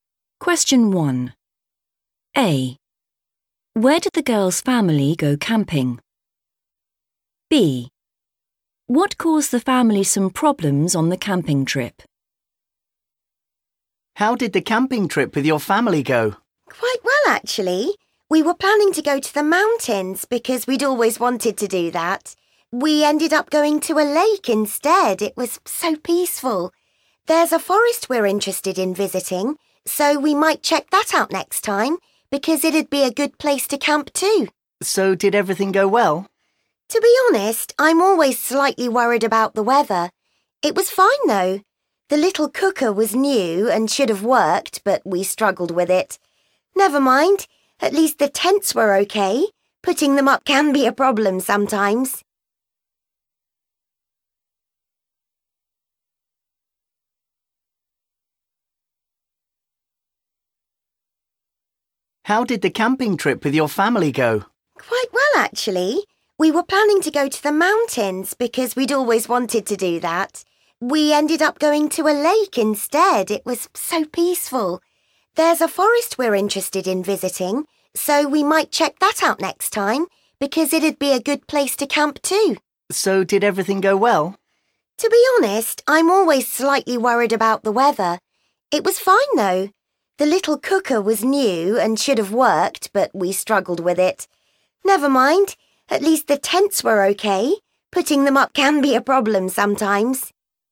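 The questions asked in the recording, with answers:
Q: Where did the girl's family go camping?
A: at a lake

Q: What caused the family some problems on the camping trip?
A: the (new) cooker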